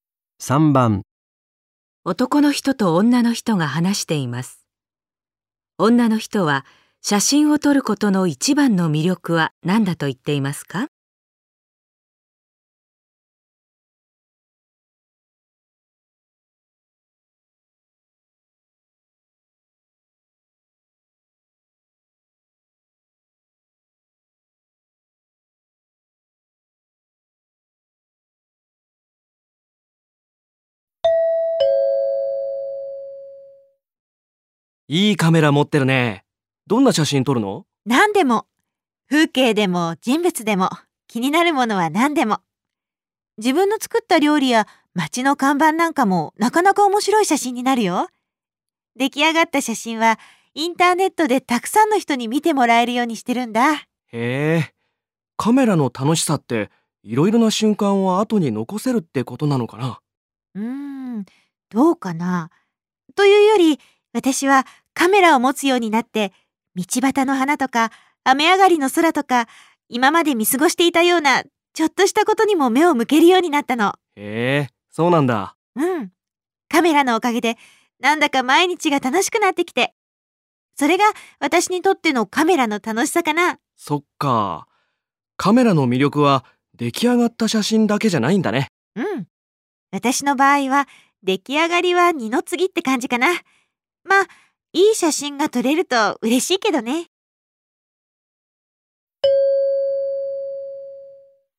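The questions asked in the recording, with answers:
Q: 女の人は写真を撮ることの一番の魅力は何だと言っていますか?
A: 今まで見過ごしていたちょっとしたことにも目を向けるようになり、毎日が楽しくなること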